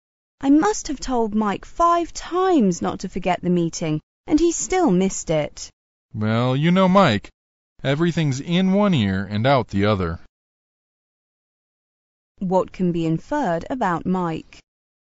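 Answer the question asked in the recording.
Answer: He is forgetful and doesn't pay attention to what he is told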